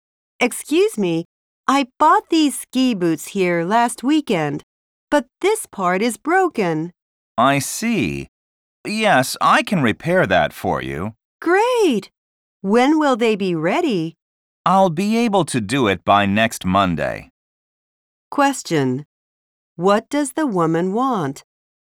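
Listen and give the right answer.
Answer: To get her broken ski boots repaired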